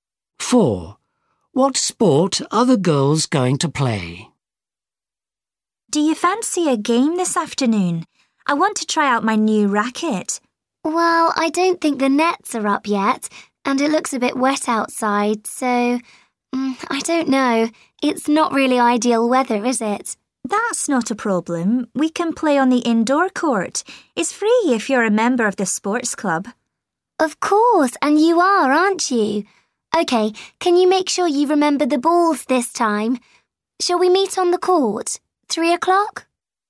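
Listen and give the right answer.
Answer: tennis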